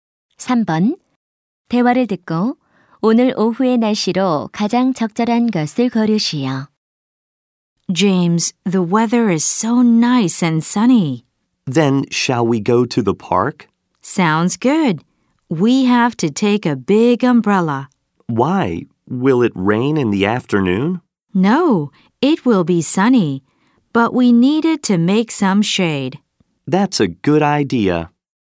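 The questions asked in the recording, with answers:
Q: 대화를 듣고 오늘 오후의 날씨로 가장 적절한 것을 고르시오.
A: 맑음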